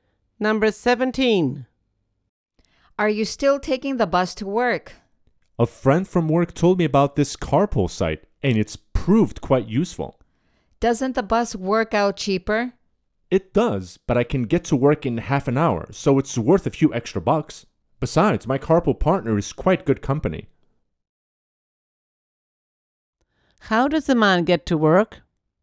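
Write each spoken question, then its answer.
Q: How does the man get to work?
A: By carpool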